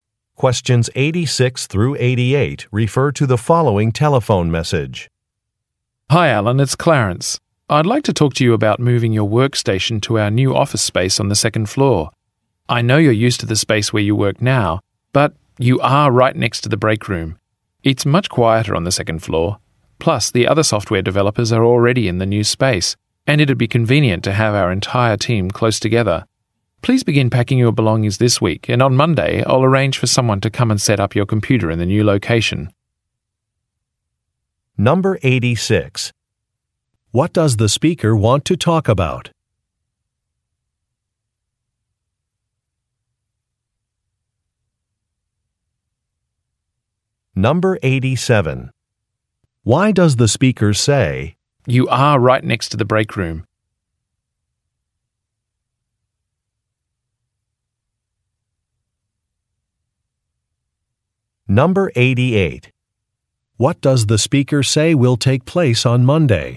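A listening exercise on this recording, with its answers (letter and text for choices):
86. What does the speaker want to talk about?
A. Working on a different project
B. Modifying an agenda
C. Moving to a new office space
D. Arranging a client visit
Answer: C. Moving to a new office space

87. Why does the speaker say, "you are right next to the break room"?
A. To suggest that a location is undesirable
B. To propose taking a break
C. To turn down a colleague's invitation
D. To ask about a convenient place to meet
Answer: A. To suggest that a location is undesirable

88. What does the speaker say will take place on Monday?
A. A sales presentation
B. A department orientation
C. A facility tour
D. A computer installation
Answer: D. A computer installation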